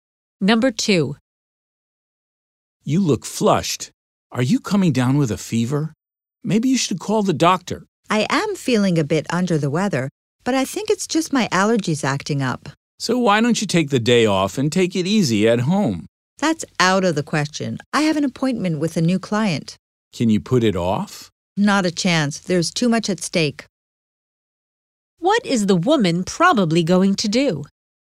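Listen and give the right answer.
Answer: Go to work to meet the new client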